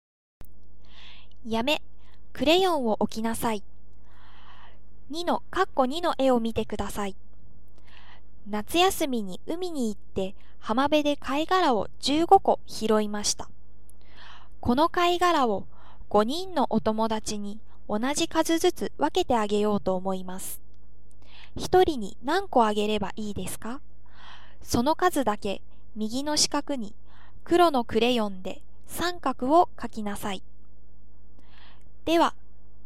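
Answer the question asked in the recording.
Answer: 3個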